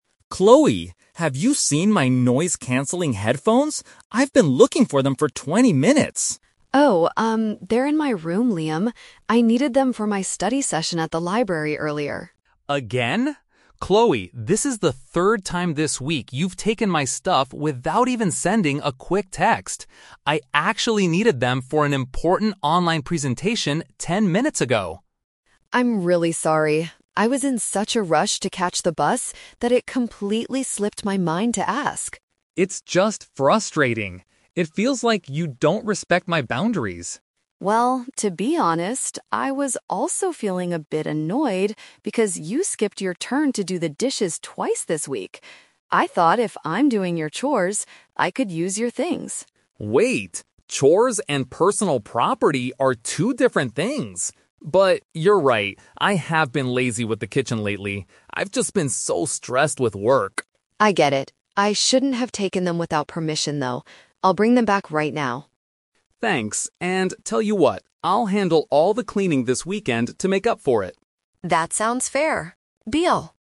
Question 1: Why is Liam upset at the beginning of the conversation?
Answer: Chloe borrowed his property without asking.

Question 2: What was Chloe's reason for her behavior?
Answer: She was in a hurry and forgot to ask for permission.

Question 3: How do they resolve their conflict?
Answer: Liam agrees to clean the house to apologize for his laziness.

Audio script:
Liam: Chloe, have you seen my noise-canceling headphones? I've been looking for them for twenty minutes!
Chloe: Oh, um, they're in my room, Liam. I needed them for my study session at the library earlier.
Liam: Again? Chloe, this is the third time this week you've taken my stuff without even sending a quick text. I actually needed them for an important online presentation ten minutes ago!
Chloe: I'm really sorry. I was in such a rush to catch the bus that it completely slipped my mind to ask.
Liam: It's just frustrating. It feels like you don't respect my boundaries.
Chloe: Well, to be honest, I was also feeling a bit annoyed because you skipped your turn to do the dishes twice this week. I thought if I'm doing your chores, I could use your things.
Liam: Wait, chores and personal property are two different things! But... you're right, I have been lazy with the kitchen lately. I've just been so stressed with work.
Chloe: I get it. I shouldn't have taken them without permission, though. I'll bring them back right now.
Liam: Thanks. And tell you what, I'll handle all the cleaning this weekend to make up for it.